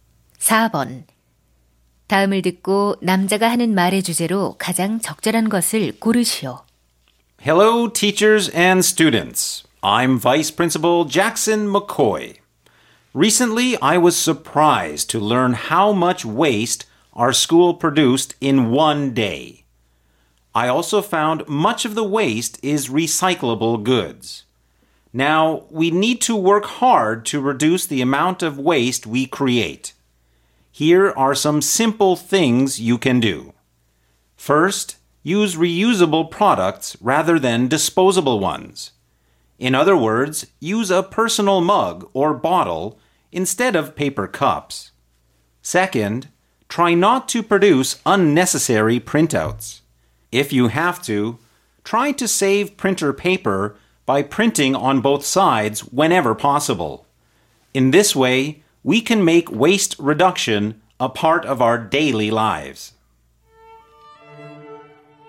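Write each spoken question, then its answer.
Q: 다음을 듣고 남자가 하는 말의 주제로 가장 적절한 것을 고르시오.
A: 학교 쓰레기를 줄이는 방법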